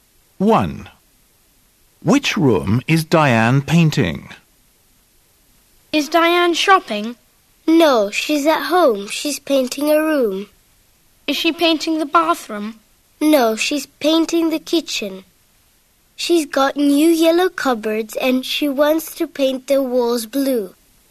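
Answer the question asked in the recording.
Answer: the kitchen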